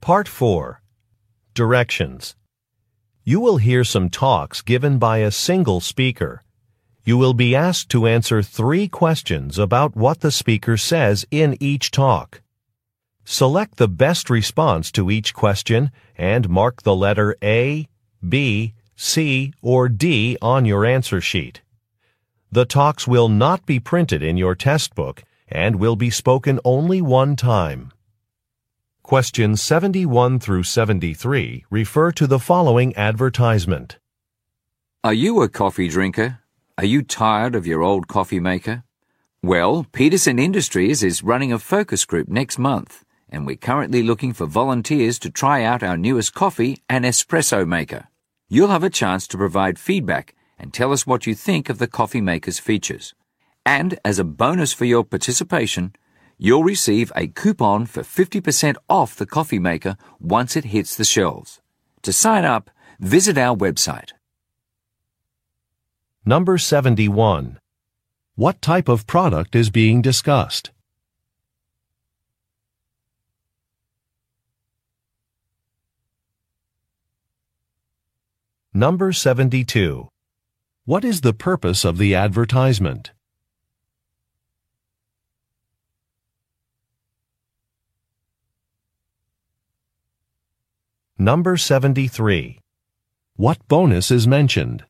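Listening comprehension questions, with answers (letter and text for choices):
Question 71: What type of product is being discussed?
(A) A coffee maker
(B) A microwave oven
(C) A portable heater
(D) A water filter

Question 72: What is the purpose of the advertisement?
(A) To reveal a product release date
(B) To announce a talent show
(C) To find volunteers for a focus group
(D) To explain details of a warranty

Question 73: What bonus is mentioned?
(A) A raffle ticket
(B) A coupon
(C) Travel reimbursement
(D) Free shipping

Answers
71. (A) A coffee maker
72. (C) To find volunteers for a focus group
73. (B) A coupon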